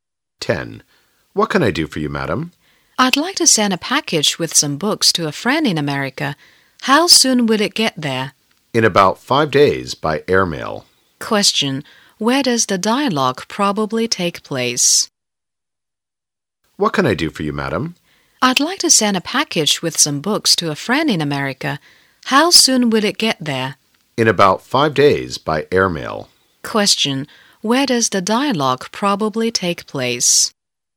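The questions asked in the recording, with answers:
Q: Where does the dialogue probably take place?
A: At a post office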